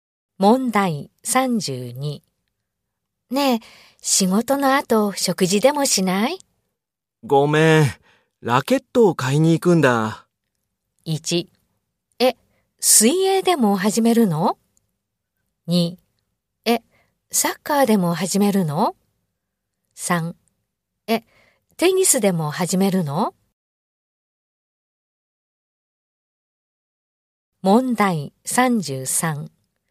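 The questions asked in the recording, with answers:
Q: ねえ、仕事の後食事でもしない?ごめん、ラケットを買いに行くんだ。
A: 3: え、テニスでも始めるの?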